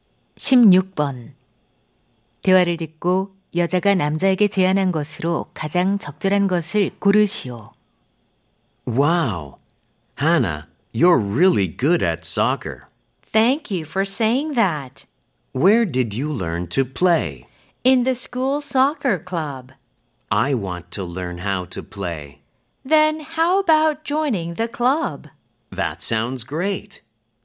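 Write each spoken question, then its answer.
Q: 대화를 듣고 여자가 남자에게 제안한 것으로 가장 적절한 것을 고르시오.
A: 학교 축구부에 가입하기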